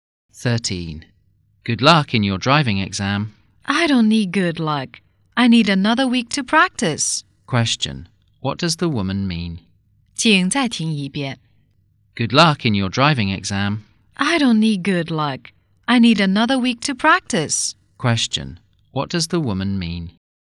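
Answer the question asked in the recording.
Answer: She isn't ready and needs more practice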